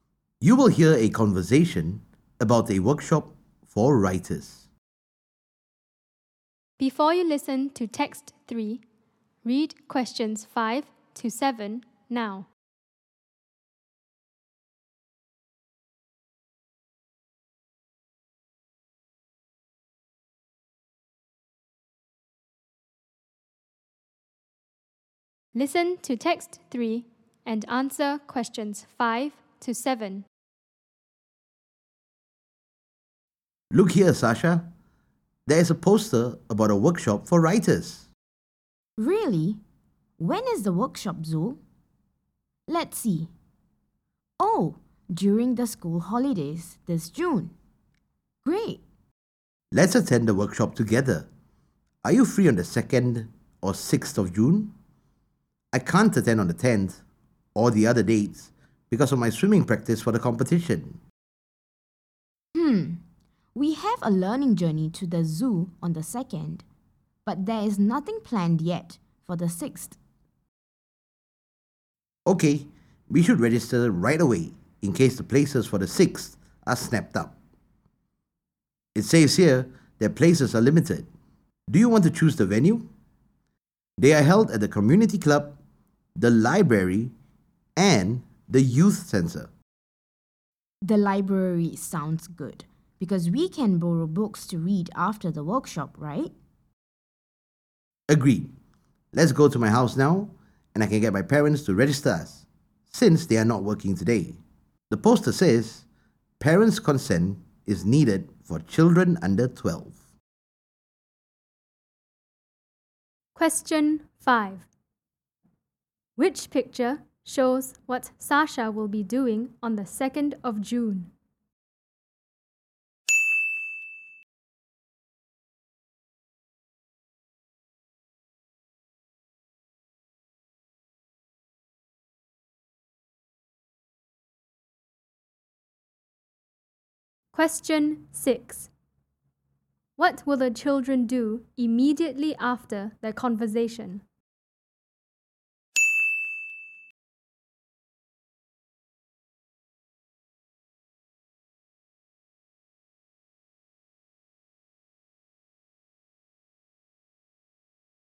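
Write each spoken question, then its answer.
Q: What will the children do immediately after their conversation?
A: Go to Zul's house to get the parents to register them for the workshop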